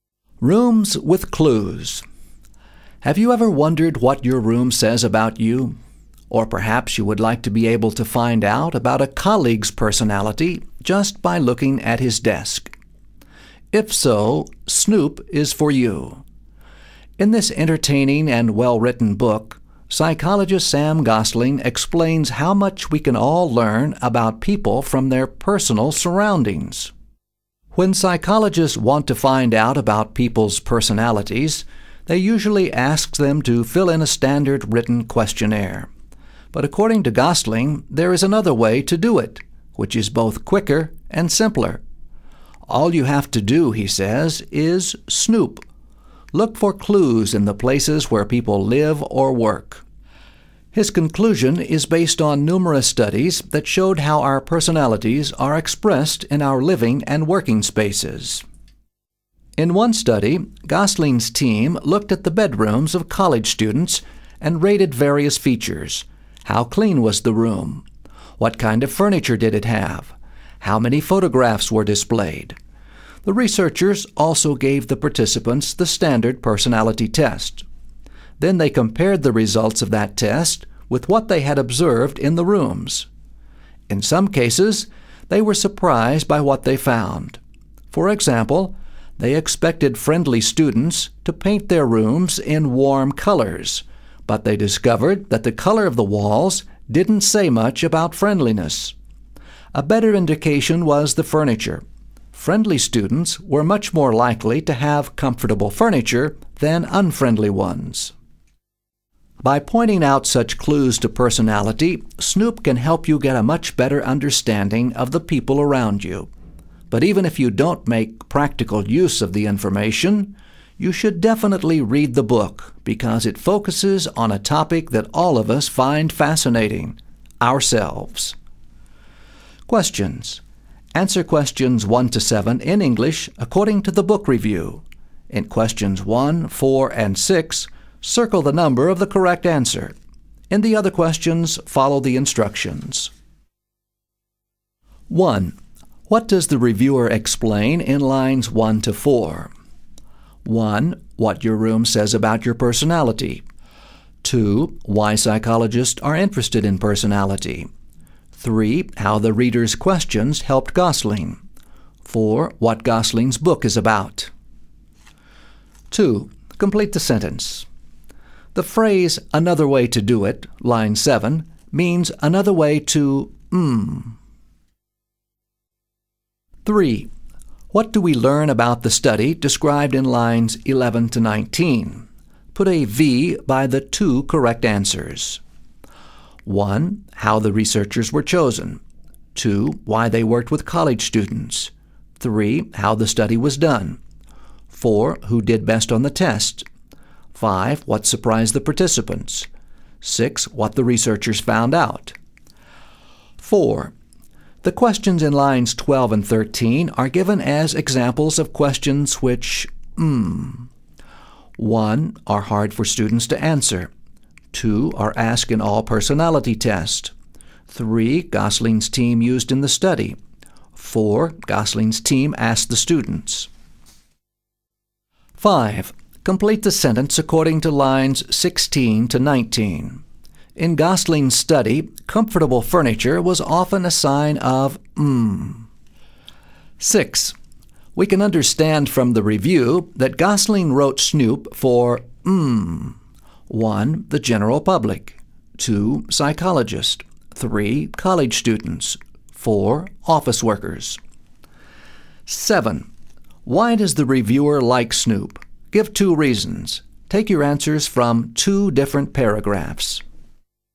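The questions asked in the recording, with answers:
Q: Complete the sentence. The phrase, another way to do it, line 7, means another way to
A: find out about people's personalities

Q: What do we learn about the study described in lines 11 to 19?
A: 3: How the study was done; 6: What the researchers found out.

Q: The questions in lines 12 and 13 are given as examples of questions which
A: 3: Gosling's team used in the study.

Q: In Gosling's study, comfortable furniture was often a sign of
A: friendliness

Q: We can understand from the review that Gosling wrote Snoop for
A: 1: The general public.

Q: Why does the reviewer like Snoop? Give two reasons. Take your answers from two different paragraphs.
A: It is entertaining and well-written; it focuses on a topic we all find fascinating, ourselves.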